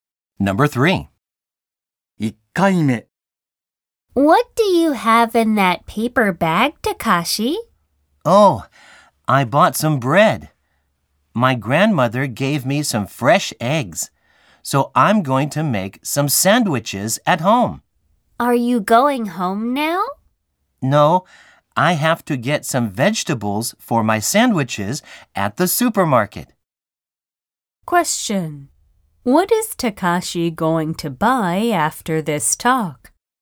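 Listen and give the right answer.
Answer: Some vegetables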